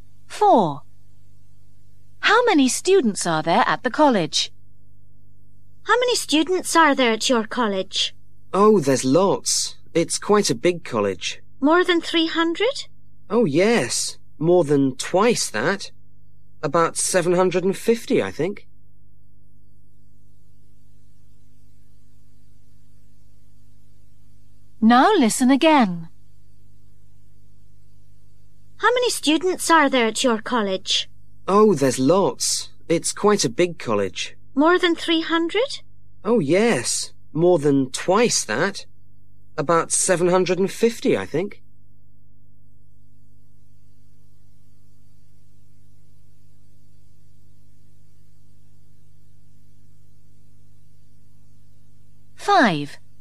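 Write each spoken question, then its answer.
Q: How many students are there at the college?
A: About 750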